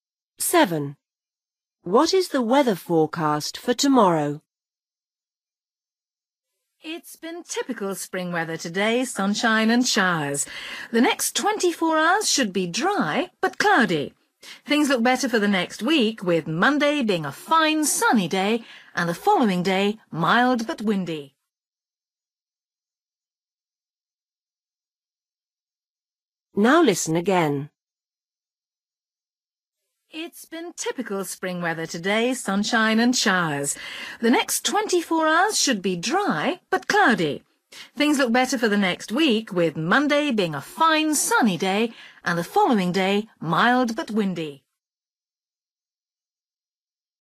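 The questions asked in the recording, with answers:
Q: What is the weather forecast for tomorrow?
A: dry but cloudy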